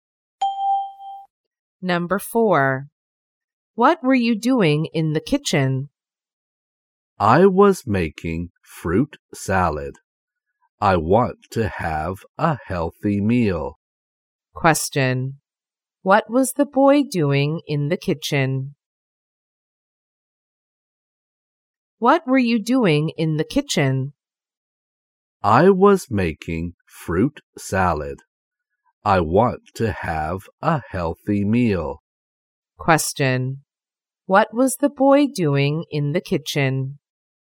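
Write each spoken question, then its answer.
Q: What was the boy doing in the kitchen?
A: Making fruit salad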